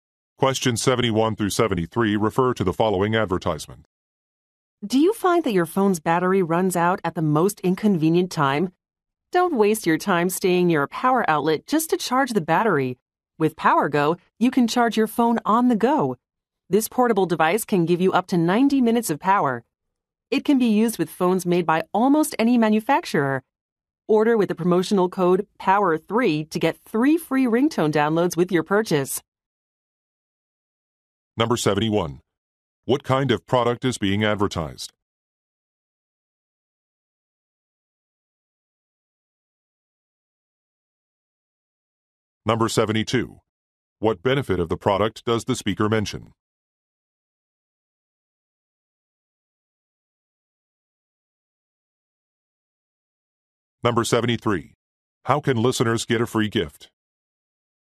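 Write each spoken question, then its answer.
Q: What kind of product is being advertised?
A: A portable phone charger

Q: How can listeners get a free gift?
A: By ordering with the promotional code POWER3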